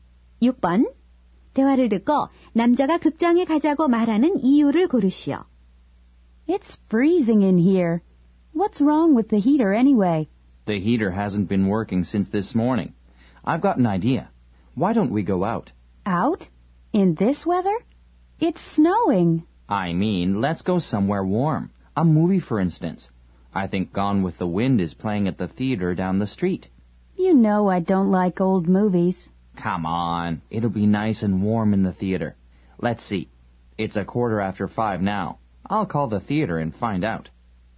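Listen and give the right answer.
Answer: 극장이 따뜻해서 (집 난방기가 고장 남)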